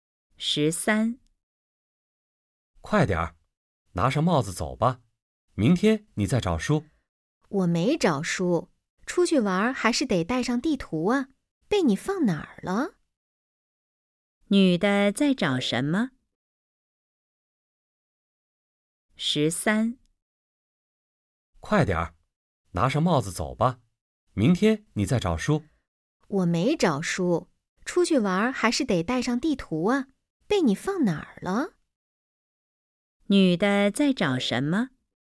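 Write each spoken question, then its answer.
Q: 女的在找什么?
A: 地图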